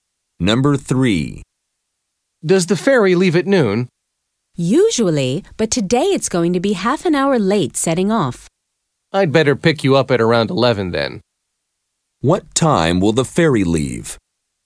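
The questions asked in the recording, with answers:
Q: What time will the ferry leave?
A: 12:30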